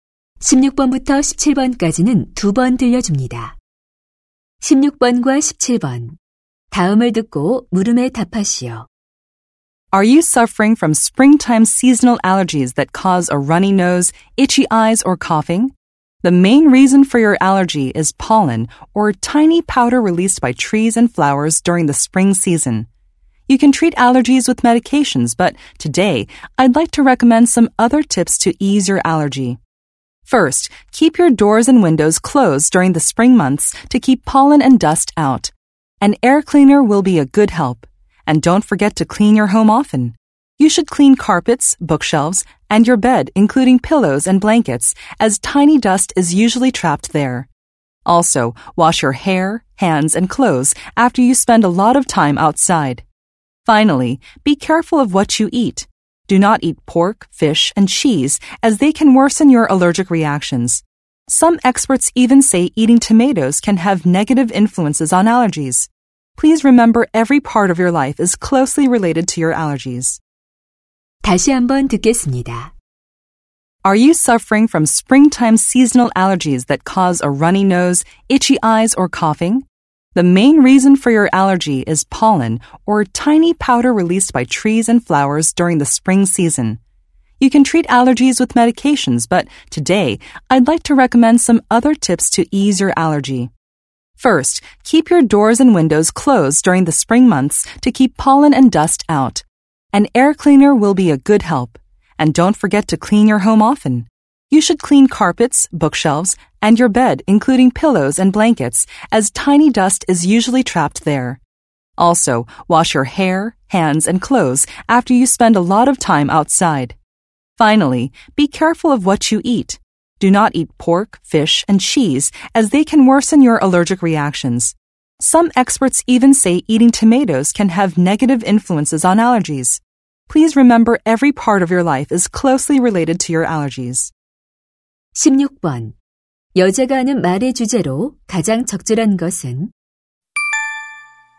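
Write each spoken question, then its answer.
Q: 여자가 하는 말의 주제로 가장 적절한 것은?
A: 봄철 알레르기를 완화하는 방법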